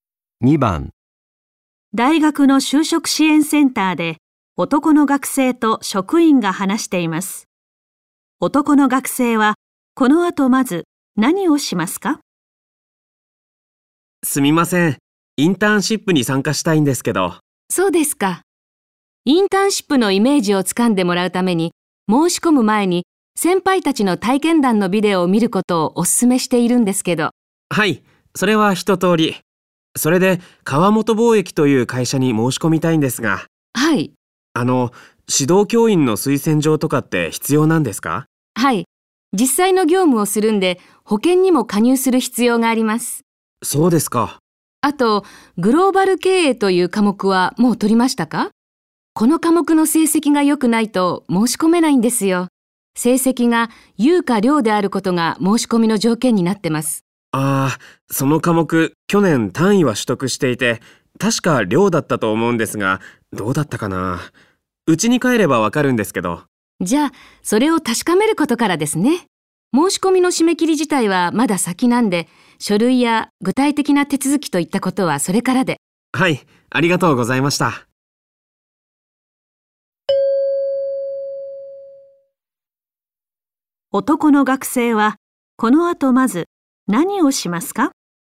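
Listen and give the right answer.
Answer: グローバル経営の成績を確かめる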